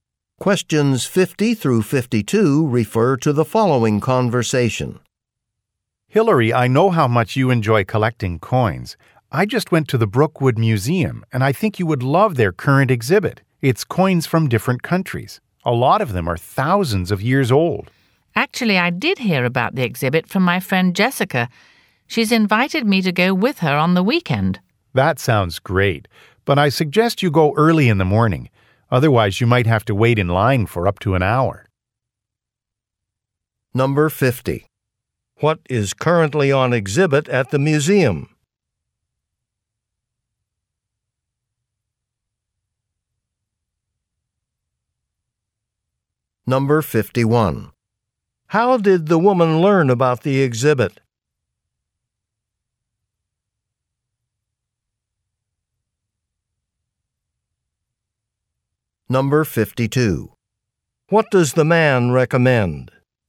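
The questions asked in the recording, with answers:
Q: What is currently on exhibit at the museum?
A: Coins from different countries

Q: How did the woman learn about the exhibit?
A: From her friend Jessica

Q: What does the man recommend?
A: Going early in the morning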